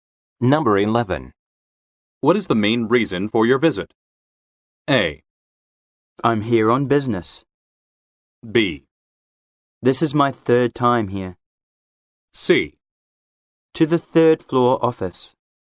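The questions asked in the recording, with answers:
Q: What is the main reason for your visit?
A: A: I'm here on business.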